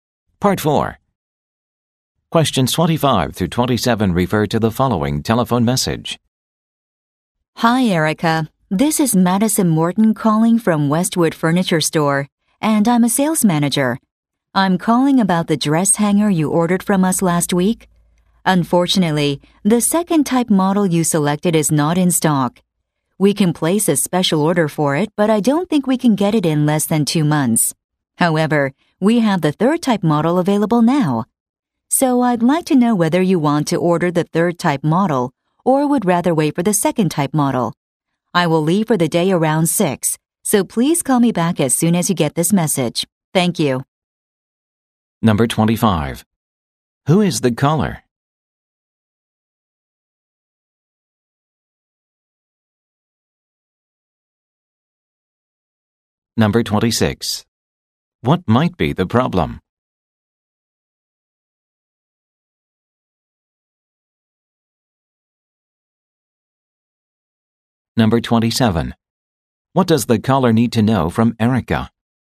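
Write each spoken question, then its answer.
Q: Who is the caller?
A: A sales manager at Westwood Furniture Store

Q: What might be the problem?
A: The ordered model is out of stock

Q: What does the caller need to know from Erica?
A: Whether she wants the third model or will wait for the second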